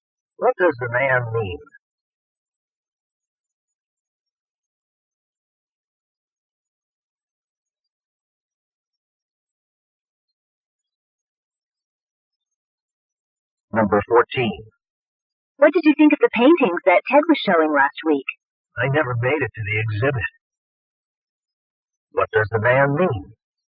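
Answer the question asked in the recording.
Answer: He didn't see Ted's paintings because he didn't go to the exhibit.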